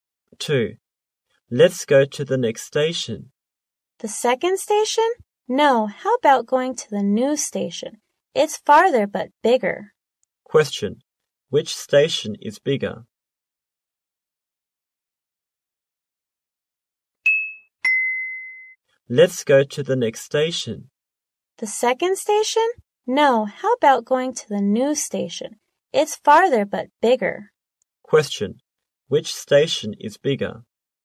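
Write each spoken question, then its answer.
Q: Which station is bigger?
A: The new station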